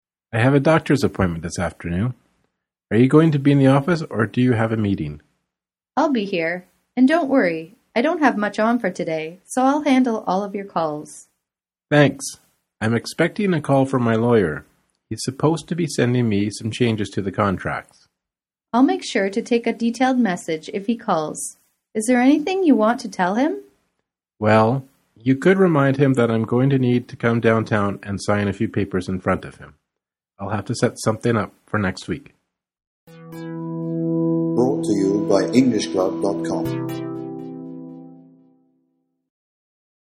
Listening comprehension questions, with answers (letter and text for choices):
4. What does the man have to do today?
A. Visit his lawyer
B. Get a massage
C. Go to the doctor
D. Make an appointment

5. What can be inferred from the conversation?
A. The woman is the man's receptionist.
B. The lawyer works in the same building.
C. The woman has no deadlines today.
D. The man and woman have a meeting this afternoon.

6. What does the woman offer to do for the man?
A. Answer his phone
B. Call his lawyer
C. Pick up the newspaper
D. Take notes at the meeting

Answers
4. C. Go to the doctor
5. C. The woman has no deadlines today.
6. A. Answer his phone

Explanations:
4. • Choice A is who the man is expecting a call from. He needs to go there next week. • Choice B confuses the sound "message" with "massage". Similar sound is a common distractor in Part III. • Choice D is not correct because the man has already made the appointment. If the question was in the past, then it could be correct. Tense is a common distractor used in Part III.
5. • Choice A is incorrect because the woman doesn't normally answer the man's calls. • Choice B is incorrect because the man mentions that he will have to go to a different location (downtown) to sign papers in front of his lawyer. • Choice D is not correct because there is no mention of this. The man will be at the doctor's office.
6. • Choice B is the opposite of what the woman offers to do. She offers to take the man's calls, not make them. • Choice C repeats the word "paper," but the conversation does not mention newspaperSimilar sound is a common distractor in Part III. • Choice D confuses the idea of taking notes at a meeting and taking a message from a phone call.

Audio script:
Man: I have a doctor's appointment this afternoon. Are you going to be in the office, or do you have a meeting?
Woman: I'll be here. And, don't worry. I don't have much on for today, so I'll handle all of your calls.
Man: Thanks. I'm expecting a call from my lawyer. He's supposed to be sending me some changes to the contracts.
Woman: I'll make sure to take a detailed message if he calls. Is there anything you want to tell him?
Man: Well, you could remind him that I'm going to need to come downtown and sign a few papers in front of him. I'll have to set something up for next week.